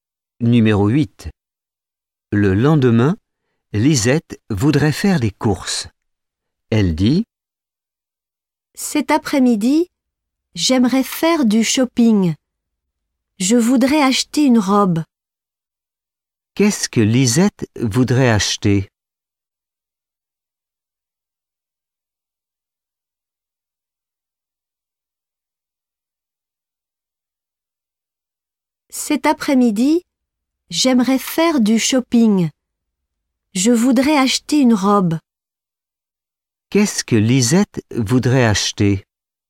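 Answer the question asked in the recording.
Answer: Une robe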